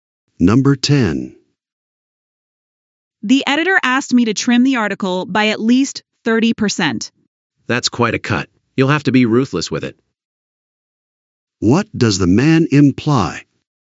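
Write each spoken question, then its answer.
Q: What does the man imply?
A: She will have to cut a lot of material without hesitating.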